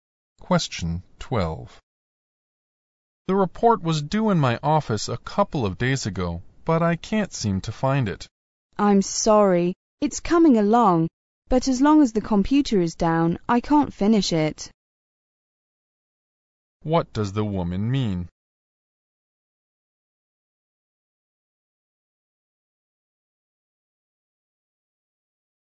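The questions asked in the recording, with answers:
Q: What does the woman mean?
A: She can't finish the report until the computer is fixed.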